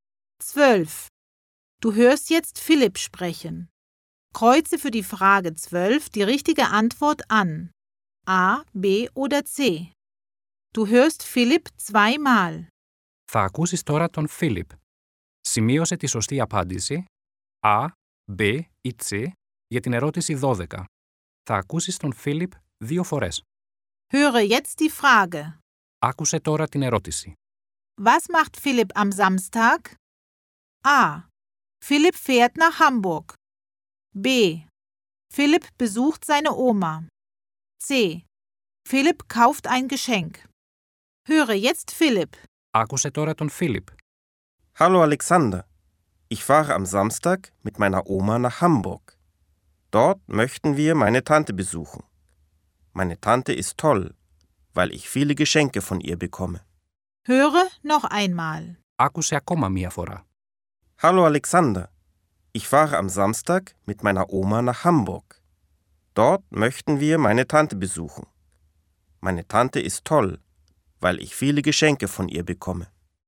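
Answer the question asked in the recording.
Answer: A: Philipp fährt nach Hamburg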